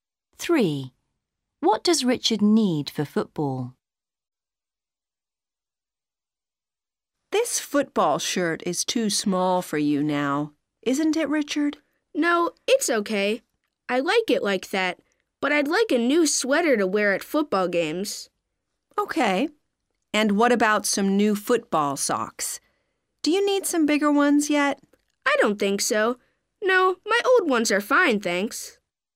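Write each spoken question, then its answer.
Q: What does Richard need for football?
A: a new sweater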